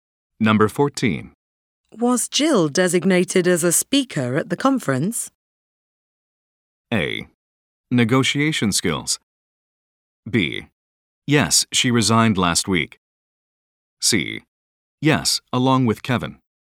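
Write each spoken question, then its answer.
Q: Was Jill designated as a speaker at the conference?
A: C: Yes, along with Kevin.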